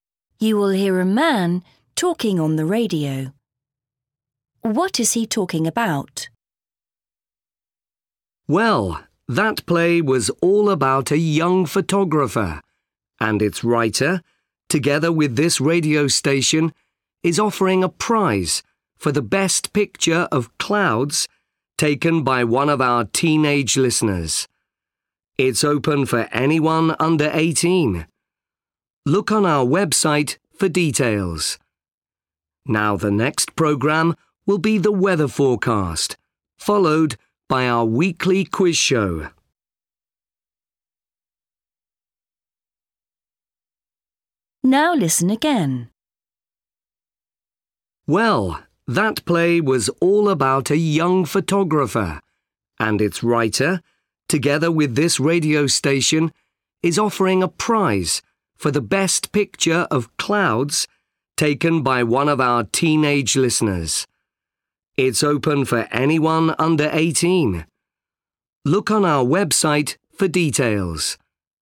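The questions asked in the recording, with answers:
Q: What is he talking about?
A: A photography competition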